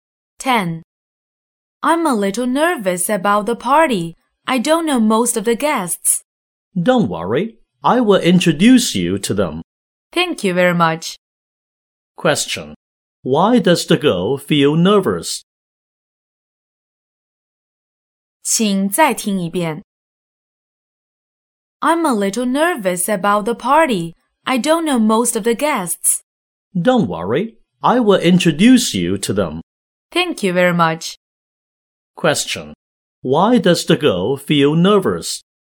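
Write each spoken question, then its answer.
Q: Why does the girl feel nervous?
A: She doesn't know most of the guests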